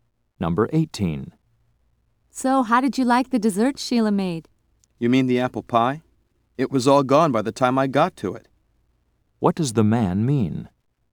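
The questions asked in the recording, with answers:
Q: What does the man mean?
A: He didn't get to taste the pie.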